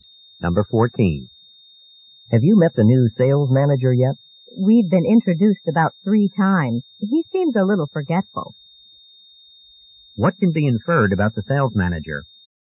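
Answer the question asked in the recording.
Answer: He keeps forgetting that he's met the speaker.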